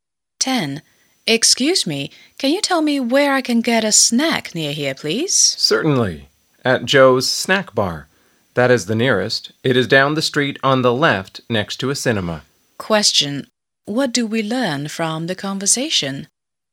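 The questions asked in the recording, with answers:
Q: What do we learn from the conversation?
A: The nearest snack bar is next to a cinema down the street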